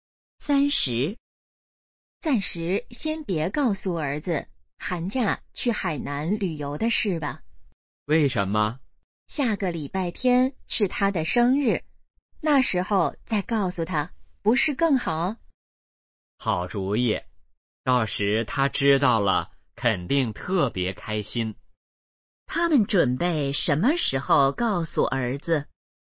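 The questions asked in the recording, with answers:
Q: 他们准备什么时候告诉儿子?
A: 下个礼拜天(儿子生日时)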